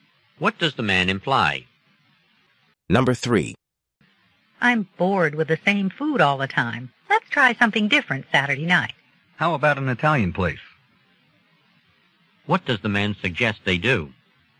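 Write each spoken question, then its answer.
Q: What does the man suggest they do?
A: Try an Italian restaurant Saturday night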